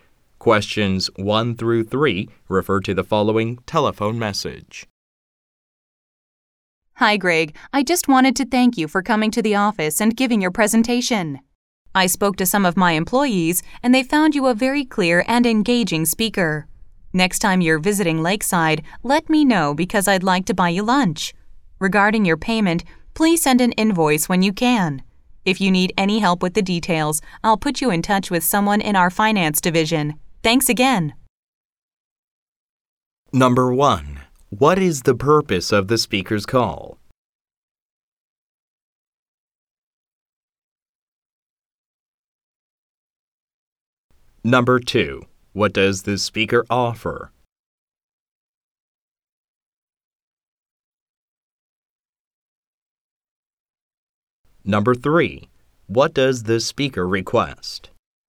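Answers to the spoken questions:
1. To thank Greg for giving a presentation
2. To buy Greg lunch
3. An invoice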